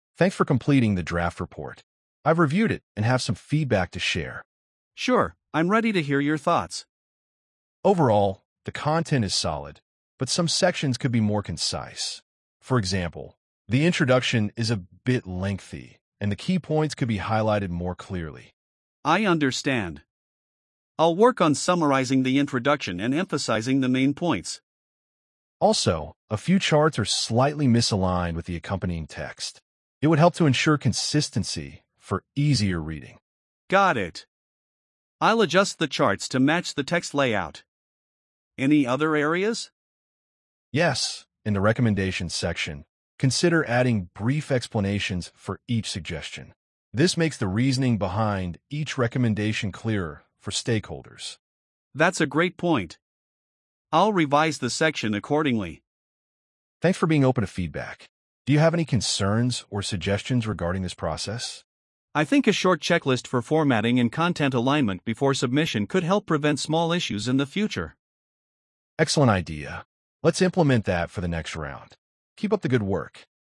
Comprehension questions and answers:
Complete the phrases as you listen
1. Thanks for completing the ______ report.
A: Thanks for completing the draft report.

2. I've reviewed it and have some ______ to share.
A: I've reviewed it and have some feedback to share.

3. The content is solid, but some sections could be more ______.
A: The content is solid, but some sections could be more concise.

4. The introduction is a bit ______.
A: The introduction is a bit lengthy.

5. It would help to ensure ______ for easier reading.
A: It would help to ensure consistency for easier reading.

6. Consider adding brief ______ for each suggestion.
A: Consider adding brief explanations for each suggestion.

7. Let's implement that ______ the next round.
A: Let's implement that for the next round.

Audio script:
"Thanks for completing the draft report. I've reviewed it and have some feedback to share."
"Sure, I'm ready to hear your thoughts."
"Overall, the content is solid, but some sections could be more concise. For example, the introduction is a bit lengthy, and the key points could be highlighted more clearly."
"I understand. I'll work on summarizing the introduction and emphasizing the main points."
"Also, a few charts are slightly misaligned with the accompanying text. It would help to ensure consistency for easier reading."
"Got it. I'll adjust the charts to match the text layout. Any other areas?"
"Yes, in the recommendations section, consider adding brief explanations for each suggestion. This makes the reasoning behind each recommendation clearer for stakeholders."
"That's a great point. I'll revise the section accordingly."
"Thanks for being open to feedback. Do you have any concerns or suggestions regarding this process?"
"I think a short checklist for formatting and content alignment before submission could help prevent small issues in the future."
"Excellent idea. Let's implement that for the next round. Keep up the good work."